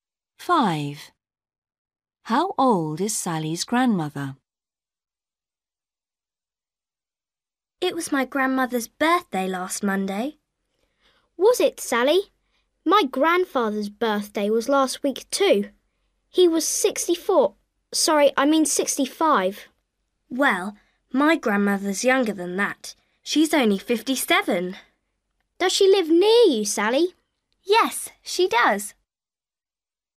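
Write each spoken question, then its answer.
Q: How old is Sally's grandmother?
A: 57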